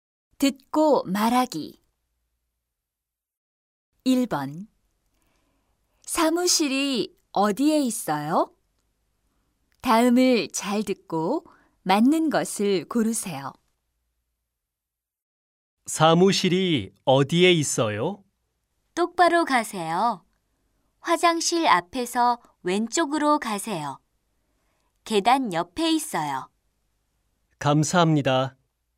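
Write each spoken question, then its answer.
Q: 사무실이 어디에 있어요?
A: 계단 옆에 있어요 (똑바로 가서 화장실 앞에서 왼쪽)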